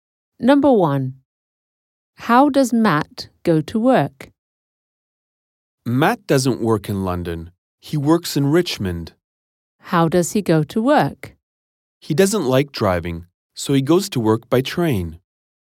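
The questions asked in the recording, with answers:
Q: How does Matt go to work?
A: By train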